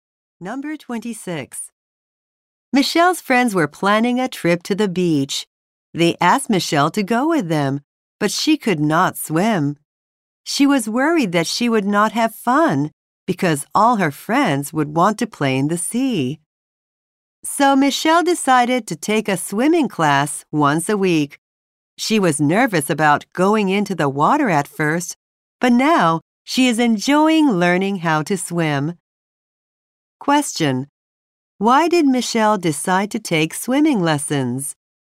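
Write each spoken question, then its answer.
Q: Why did Michelle decide to take swimming lessons?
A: She was going to the beach with friends and could not swim.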